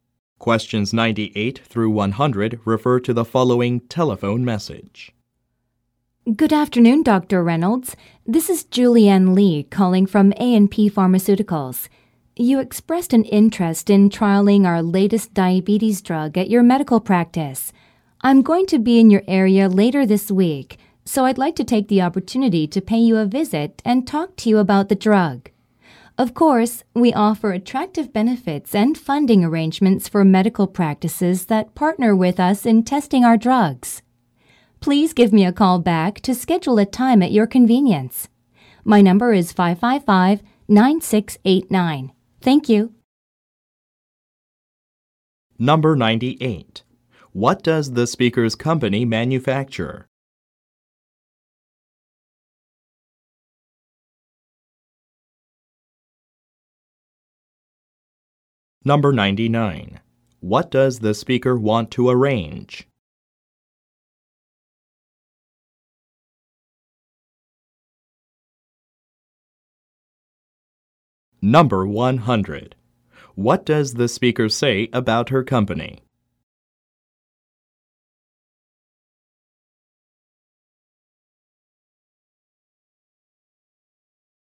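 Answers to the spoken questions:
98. Drugs (pharmaceuticals)
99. A visit to talk about the drug
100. It offers attractive benefits and funding to medical practices that partner in drug testing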